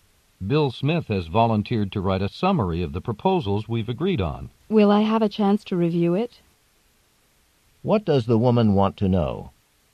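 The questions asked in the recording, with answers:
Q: What does the woman want to know?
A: Whether she will get to review Bill Smith's summary of the proposals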